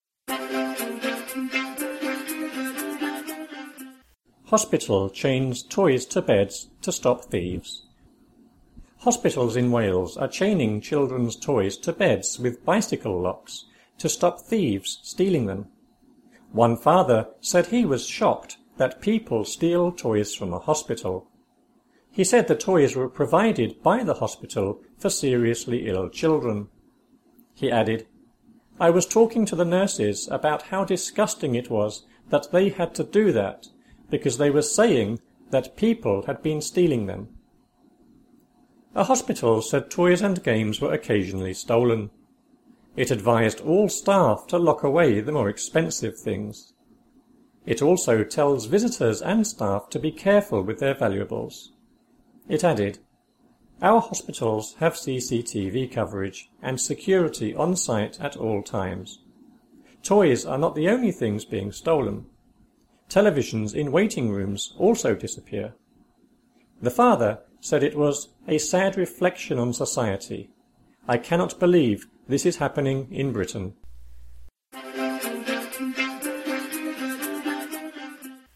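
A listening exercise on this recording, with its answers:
FILL IN THE BLANKS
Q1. Hospitals in Wales are chaining children's (1) ___________________ bicycle locks to stop thieves stealing them.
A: toys to beds with

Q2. One father (2) ___________________ that people (3) ___________________ hospital.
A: said he was shocked

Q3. One father (2) ___________________ that people (3) ___________________ hospital.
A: steal toys from a

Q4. He said the toys were provided by the hospital (4) ___________________ children.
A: for seriously ill

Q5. He added: "I was talking to the nurses (5) ___________________ it was that they had to do that because they were saying that people (6) ___________________ them."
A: about how disgusting

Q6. He added: "I was talking to the nurses (5) ___________________ it was that they had to do that because they were saying that people (6) ___________________ them."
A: had been stealing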